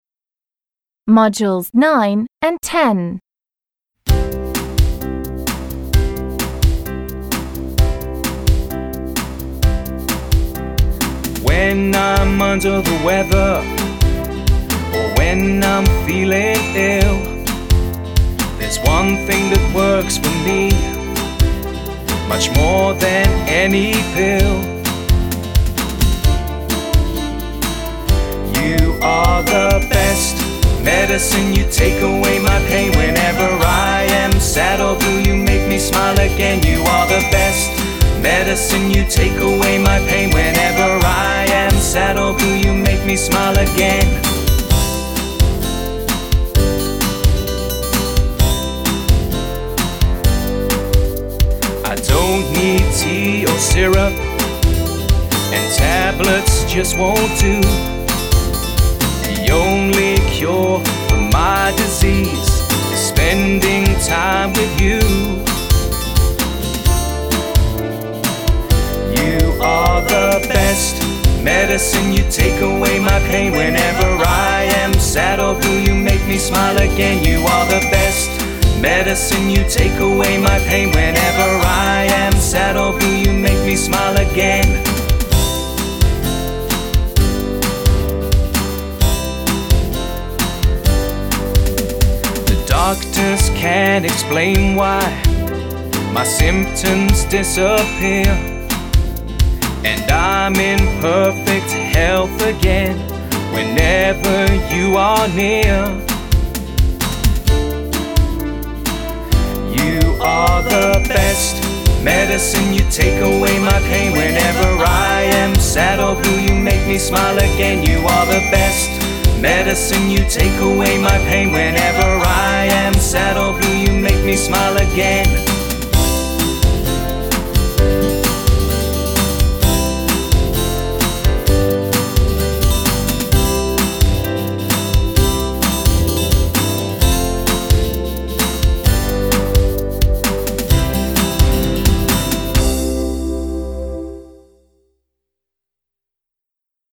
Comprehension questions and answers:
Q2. What makes the singer feel better?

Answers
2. The singer feels better when the special person is near. They say this person is "the best medicine" – better than pills or syrup!

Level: Spotlight 7